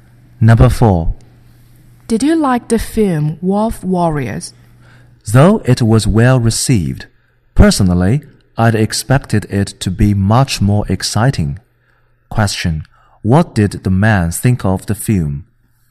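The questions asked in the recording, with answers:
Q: What did the man think of the film?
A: It was less exciting than he had expected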